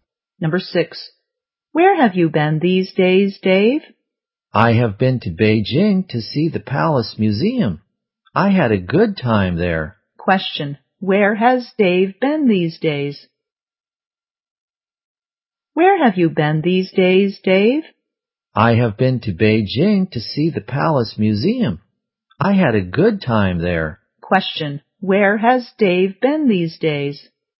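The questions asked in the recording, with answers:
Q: Question, where has Dave been these days?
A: Beijing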